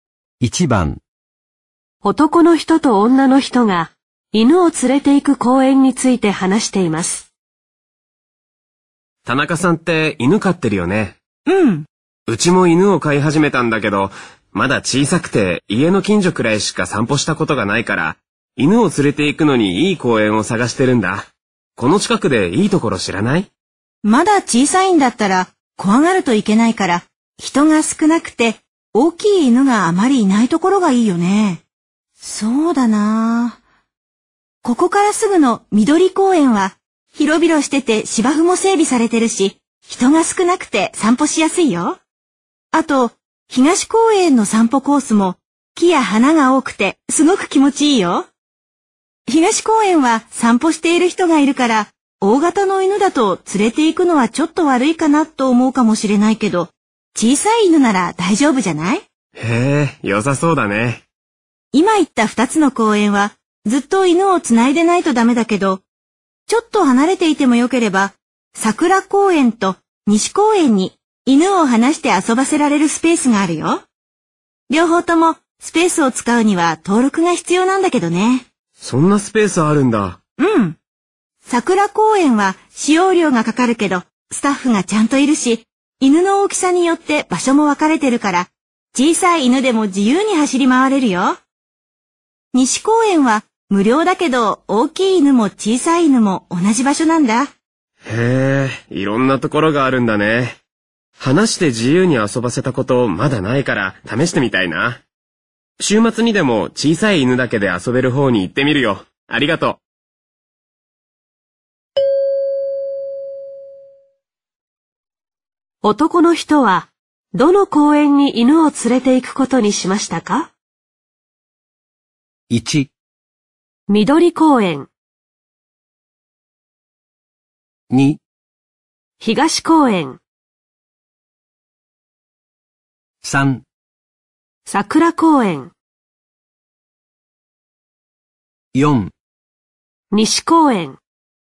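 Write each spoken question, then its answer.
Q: 男の人は、どの公園に犬を連れて行くことにしましたか?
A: 3: 桜公園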